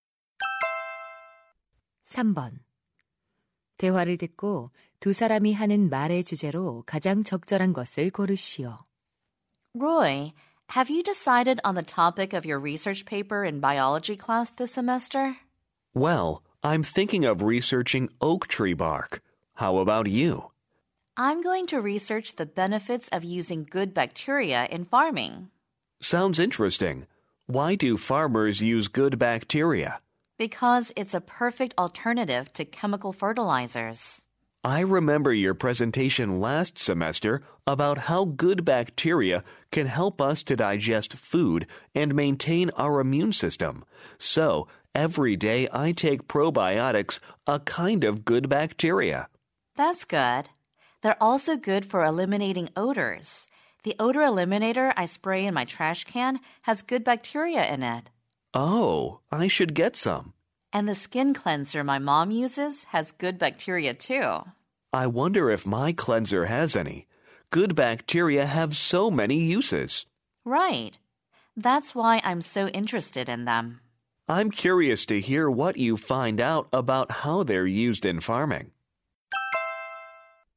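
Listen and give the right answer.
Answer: 유익균의 다양한 용도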